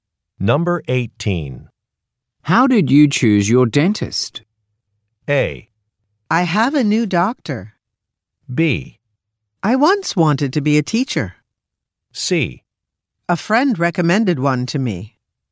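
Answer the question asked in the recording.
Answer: C: A friend recommended one to me.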